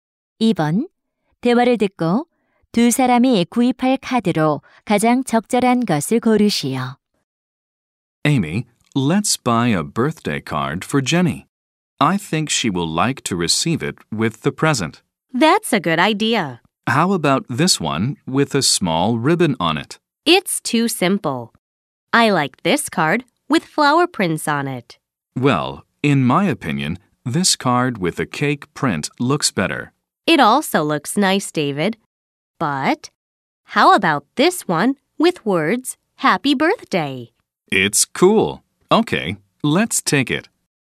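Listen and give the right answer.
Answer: Happy Birthday라는 글자가 있는 카드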